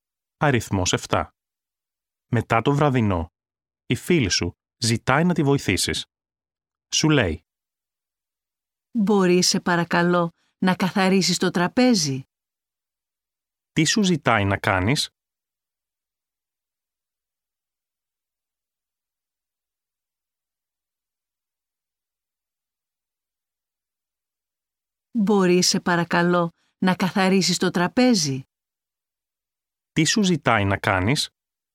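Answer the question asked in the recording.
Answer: Να καθαρίσεις το τραπέζι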